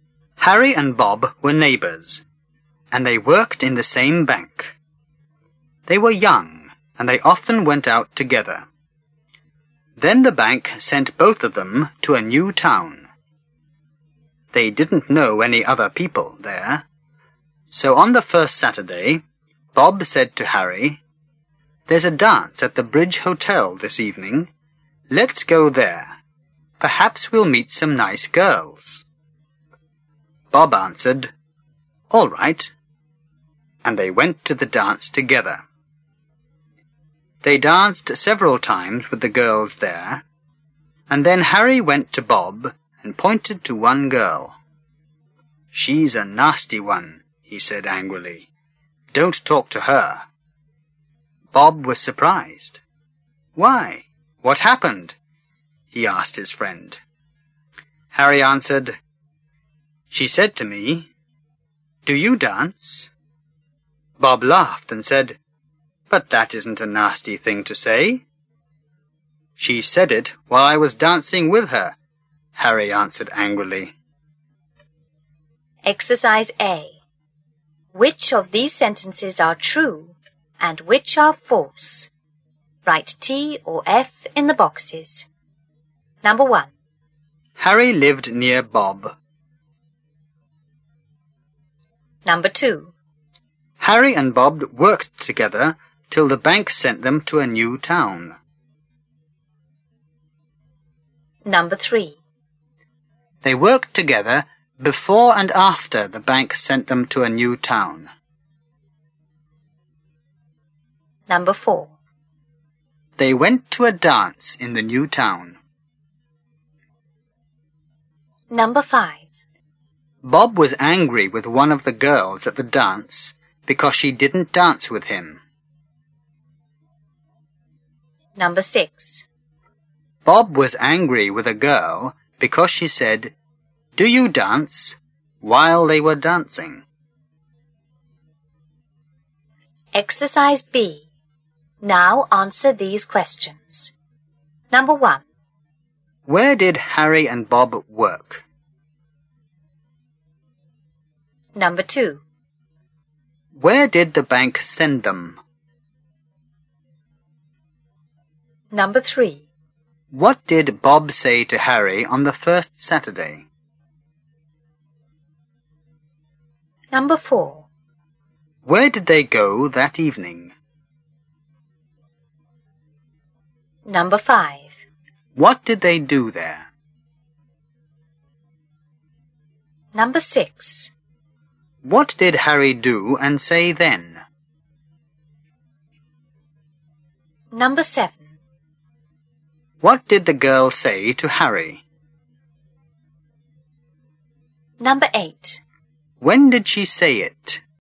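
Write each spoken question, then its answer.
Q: Where did Harry and Bob work?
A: In the same bank.

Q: Where did the bank send them?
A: To a new town.

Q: What did Bob say to Harry on the first Saturday?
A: There's a dance at the Bridge Hotel this evening. Let's go there.

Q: Where did they go that evening?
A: To the dance at the Bridge Hotel.

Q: What did they do there?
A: They danced several times with the girls.

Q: What did Harry do and say then?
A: He pointed to a girl and said she was a nasty one and not to talk to her.

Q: What did the girl say to Harry?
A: "Do you dance?"

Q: When did she say it?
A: While he was dancing with her.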